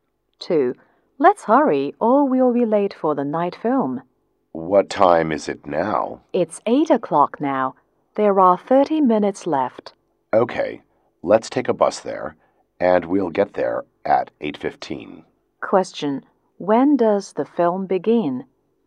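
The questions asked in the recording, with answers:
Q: when does the film begin?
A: At 8:30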